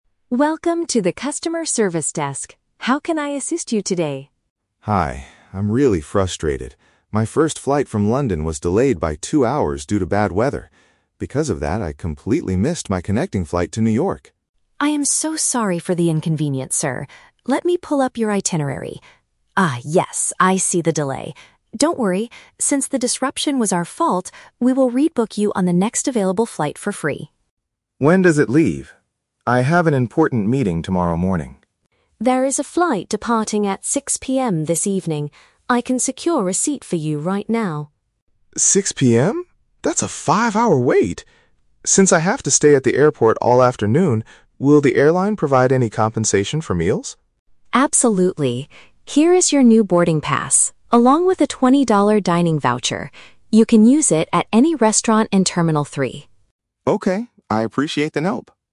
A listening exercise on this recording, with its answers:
Listen to the conversation between a passenger and an airline agent. Choose the correct answer (A, B, or C) for each question.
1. Why did the passenger miss his flight to New York?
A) He arrived at the airport two hours late.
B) His previous flight did not arrive on time.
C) Severe weather caused the airline to cancel his trip.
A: His previous flight did not arrive on time.

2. What does the agent offer to do for the passenger?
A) Give him a full refund for his plane ticket.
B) Upgrade his seat on the 6:00 PM flight.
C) Put him on a later plane at no extra cost.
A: Put him on a later plane at no extra cost.

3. What does the man ask for because of his long wait?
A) Free food and drinks.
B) A hotel room for the night.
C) $20 in cash to spend at the terminal.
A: Free food and drinks.

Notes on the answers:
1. The man says his "first flight... was delayed by two hours." "Delayed" means it did not arrive on time.
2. The agent promises to "rebook you on the next available flight for free." Option (C) uses synonyms ("later plane", "no extra cost") to express this exact idea.
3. The man asks if the airline will provide "compensation for meals." Meals mean food and drinks. The agent agrees and gives him a dining voucher.

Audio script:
Agent: Welcome to the customer service desk. How can I assist you today?
Passenger: Hi, I'm really frustrated. My first flight from London was delayed by two hours due to bad weather. Because of that, I completely missed my connecting flight to New York!
Agent: I am so sorry for the inconvenience, sir. Let me pull up your itinerary. Ah, yes, I see the delay. Don't worry, since the disruption was our fault, we will rebook you on the next available flight for free.
Passenger: When does it leave? I have an important meeting tomorrow morning.
Agent: There is a flight departing at 6:00 PM this evening. I can secure a seat for you right now.
That's a five-hour wait! Since I have to stay at the airport all afternoon, will the airline provide any compensation for meals?
Agent: Absolutely. Here is your new boarding pass, along with a $20 dining voucher. You can use it at any restaurant in Terminal 3.
Passenger: Okay, I appreciate the help.

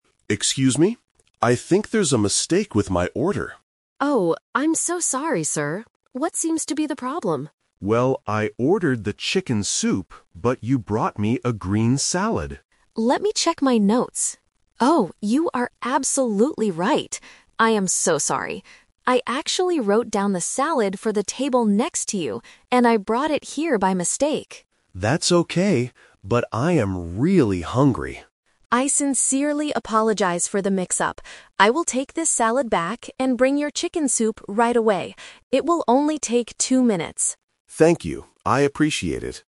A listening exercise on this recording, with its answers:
Listen to the conversation and choose the correct answer (A, B, or C).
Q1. What did the customer originally order?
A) A green salad.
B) A chicken sandwich.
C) Chicken soup.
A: Chicken soup.

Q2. Why did the waiter make a mistake?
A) She forgot to write down the order.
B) She gave the customer another table's food.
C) The kitchen cooked the wrong food.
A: She gave the customer another table's food.

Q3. What will the waiter do next?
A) Bring the chicken soup immediately.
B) Ask the customer to wait ten minutes.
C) Give the customer a free meal.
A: Bring the chicken soup immediately.

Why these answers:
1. The customer clearly states, "I ordered the chicken soup..." Trap: Option (A) is the "Twist" trap. The green salad is what he received, not what he ordered. Option (B) is a plausible food item but is never mentioned.
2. The waiter explains, "I actually wrote down the salad for the table next to you, and I brought it here by mistake." Trap: Option (A) is a trap because the waiter did write it down (she says "Let me check my notes"). Option (C) is a common restaurant problem, but it was the waiter's fault, not the kitchen's.
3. The waiter promises to "bring your chicken soup right away." (Right away = immediately). Trap: Option (B) is a trap because the audio mentions time ("two minutes"), but not ten minutes. Option (C) is a common way to say sorry in real life, but it is not mentioned in the conversation.

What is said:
Customer: Excuse me? I think there's a mistake with my order.
Waiter: Oh, I'm so sorry, sir. What seems to be the problem?
Customer: Well, I ordered the chicken soup, but you brought me a green salad.
Waiter: Let me check my notes... Oh, you are absolutely right. I am so sorry. I actually wrote down the salad for the table next to you, and I brought it here by mistake.
Customer: That's okay. But I am really hungry.
Waiter: I sincerely apologize for the mix-up. I will take this salad back and bring your chicken soup right away. It will only take two minutes.

